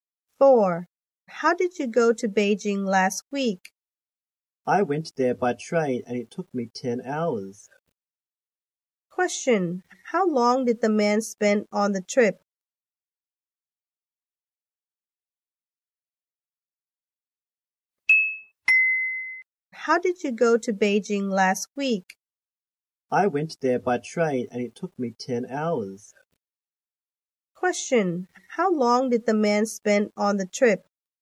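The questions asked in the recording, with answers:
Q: Question: How long did the man spend on the trip?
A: 10 hours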